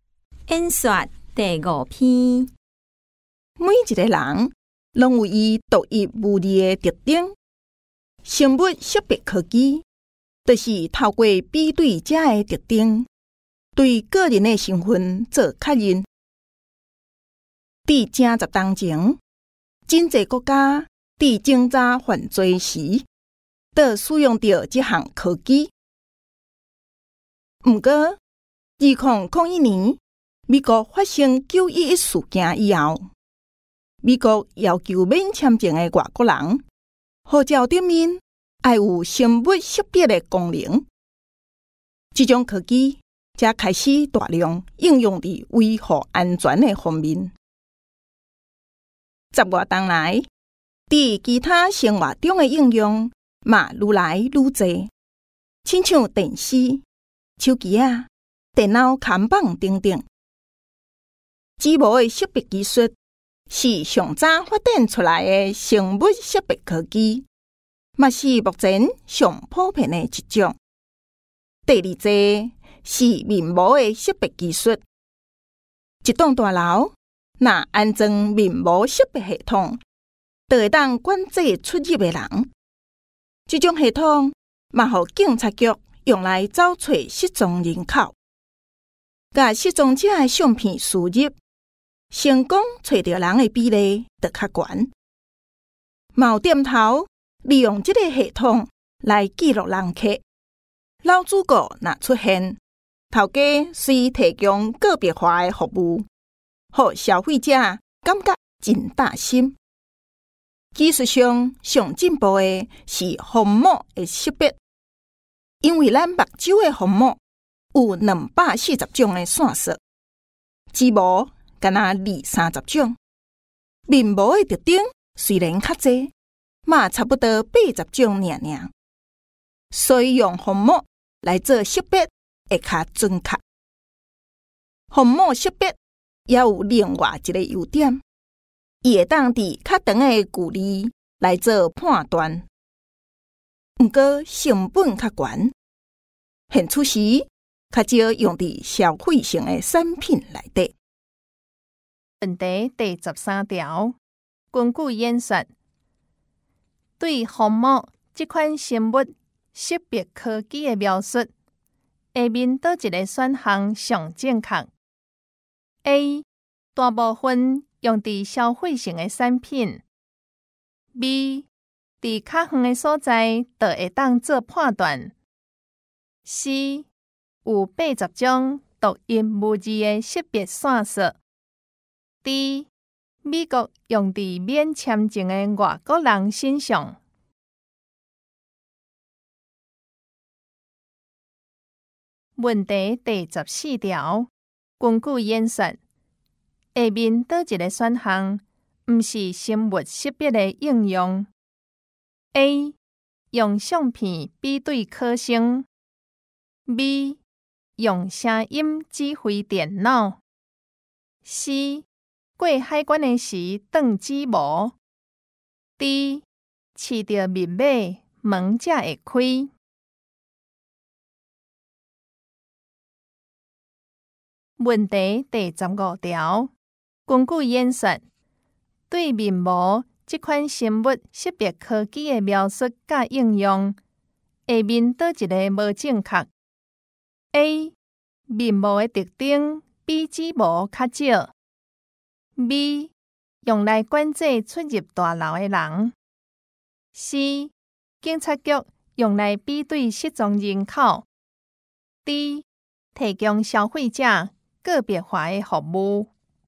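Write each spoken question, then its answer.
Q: 根据演说,对虹膜这款生物识别科技的描述,下面哪一个选项最正确?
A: B: 在较远的地方就可以做判断

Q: 根据演说,对面膜这款生物识别科技的描述和应用,下面哪一个无正确?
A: A: 面膜的特征比指模较少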